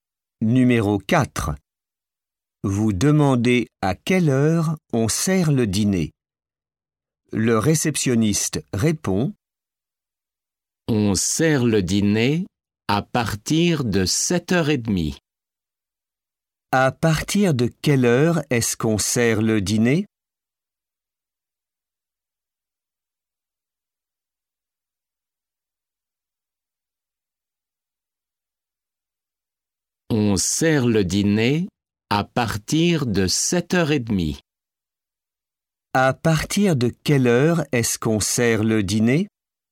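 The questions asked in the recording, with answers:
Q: À partir de quelle heure est-ce qu'on sert le dîner?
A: À partir de 7h30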